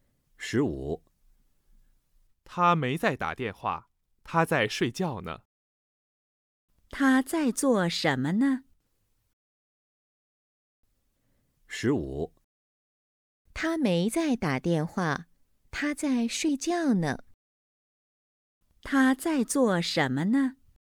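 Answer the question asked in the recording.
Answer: 在睡觉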